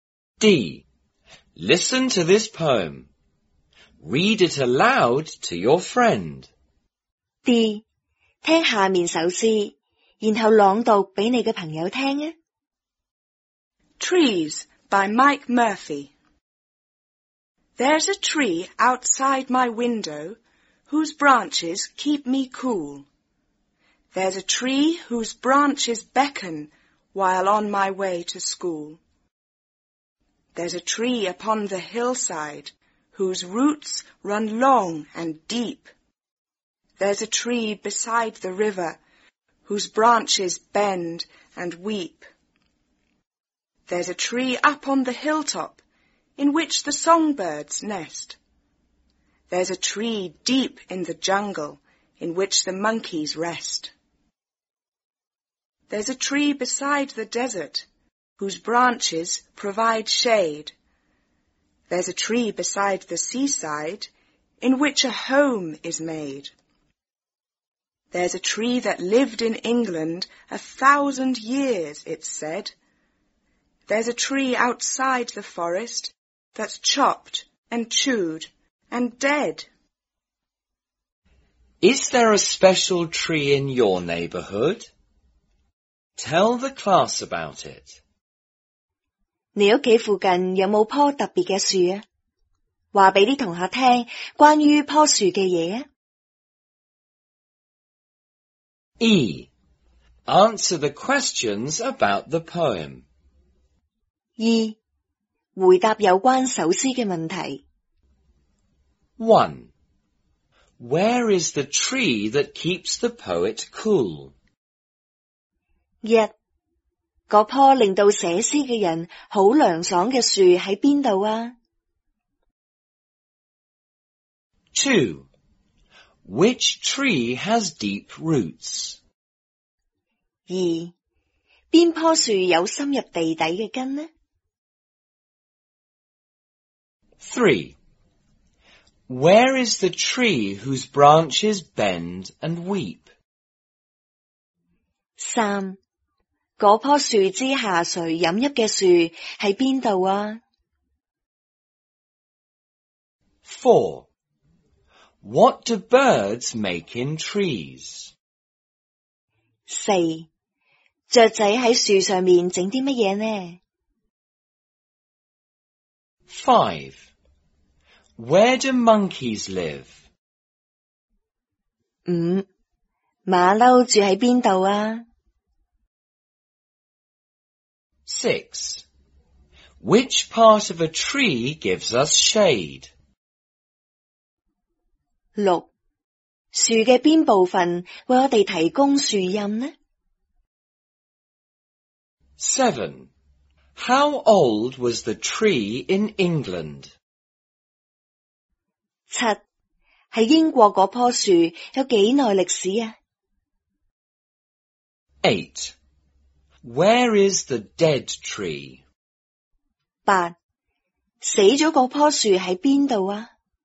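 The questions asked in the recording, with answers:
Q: Where is the tree that keeps the poet cool?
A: Outside the poet's window

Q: Which tree has deep roots?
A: The tree upon the hillside

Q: Where is the tree whose branches bend and weep?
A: Beside the river

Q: What do birds make in trees?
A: Nests

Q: Where do monkeys live?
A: In a tree deep in the jungle

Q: Which part of a tree gives us shade?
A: The branches

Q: How old was the tree in England?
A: 1,000 years old

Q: Where is the dead tree?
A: Outside the forest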